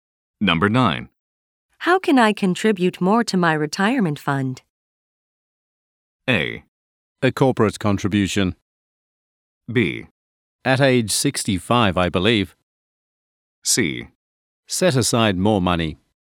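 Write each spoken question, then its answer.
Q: How can I contribute more to my retirement fund?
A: C: Set aside more money.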